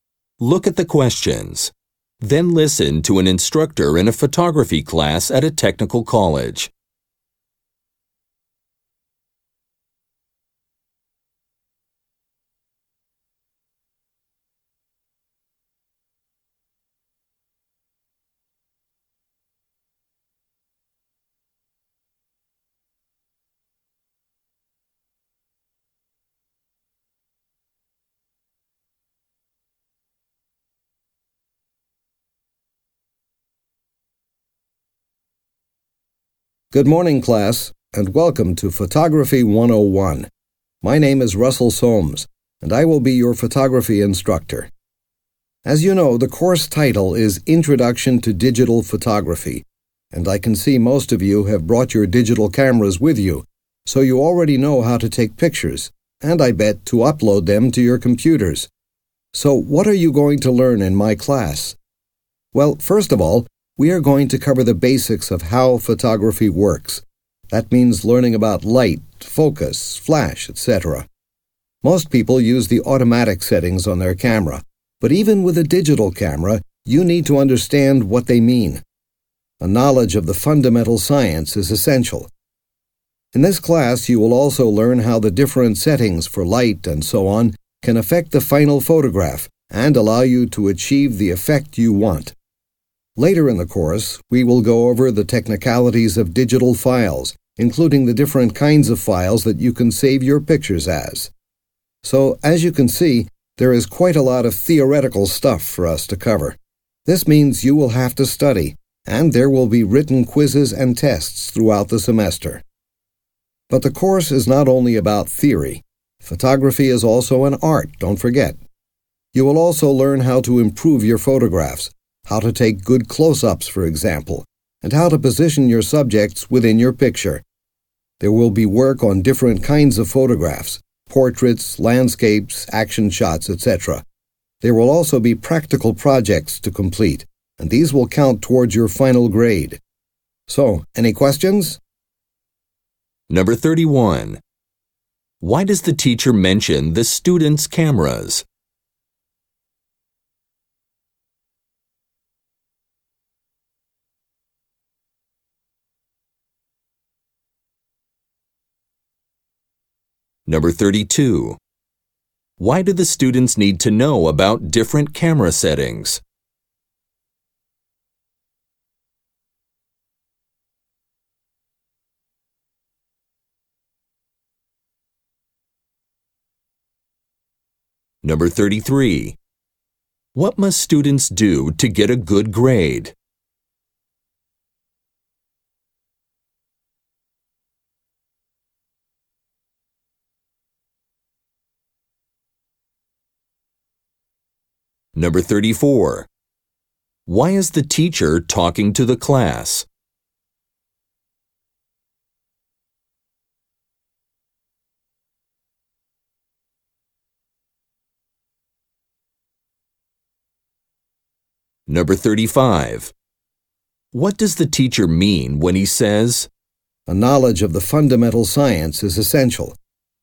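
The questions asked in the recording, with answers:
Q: Why do the students need to know about different camera settings?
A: To get the effect they want in the final photograph

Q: What must students do to get a good grade?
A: Complete practical projects

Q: Why is the teacher talking to the class?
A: To introduce the course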